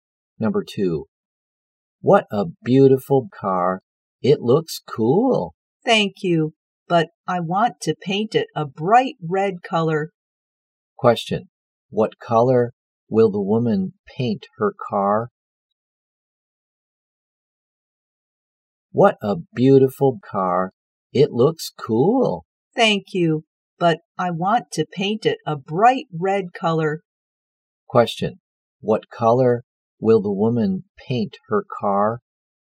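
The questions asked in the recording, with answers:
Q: What color will the woman paint her car?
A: Bright red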